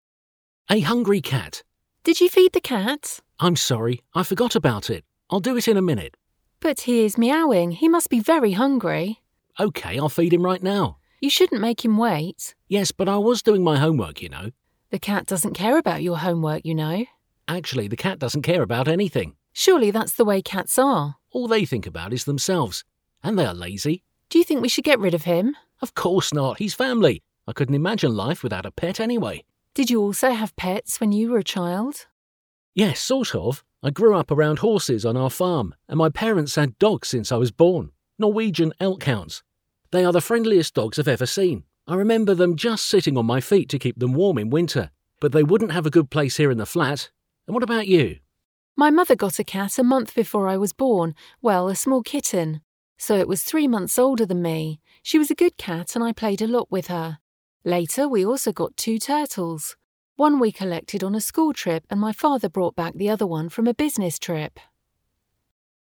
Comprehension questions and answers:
Listen to the dialogue and fill in the gaps.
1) The man forgot to ....... .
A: feed the cat

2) He forgot it because ........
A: he was doing his homework

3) The man thinks that the cat doesn't care ....... .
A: about anything

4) He thinks cats are ...... .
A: lazy

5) He couldn't imagine ........... .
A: life without a pet

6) He grew up on ..... around ..... .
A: a farm, horses

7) He remembers their dogs sitting on ..... to ...... in winter.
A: his feet, keep them warm

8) The woman had a cat, which was ......... .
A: three months older than her

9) She also had two ....... .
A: turtles

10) One came from ......... and the other from ......... .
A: a school trip, her father's business trip

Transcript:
A hungry cat
A (woman): Did you feed the cat?
B: (man) I'm sorry, I forgot about it. I'll do it in a minute.
A: But he is meowing. He must be very hungry.
B: Okay. I'll feed him right now.
A: You shouldn't make him wait.
B: Yes, but I was doing my homework, you know.
A: The cat doesn't care about your homework, you know.
A: Surely, that's the way cats are.
B: All they think about is themselves. And they are lazy.
A: Do you think we should get rid of him?
B: Of course, not! He's family. I couldn't imagine life without a pet, anyway.
A: Did you also have pets when you were a child?
B: Yes, sort of. I grew up around horses on our farm and my parents had dogs since I was born. They are the friendliest dogs I've ever seen. I remember them just sitting on my feet to keep them warm in winter. But they wouldn't have a good place here in a flat. And what about you?
A: My mother got a cat a month before I was born. Well, a small kitten. So it was three months older than me. She was a good cat and I played a lot with her. Later we also got two turtles. One we collected on a school trip and my father brought back the other one from a business trip.

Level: Alapfok (B1)